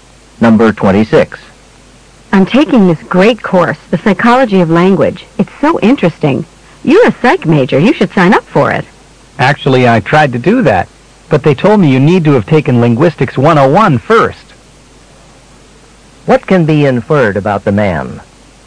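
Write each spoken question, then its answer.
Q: What can be inferred about the man?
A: He hasn't taken Linguistics 101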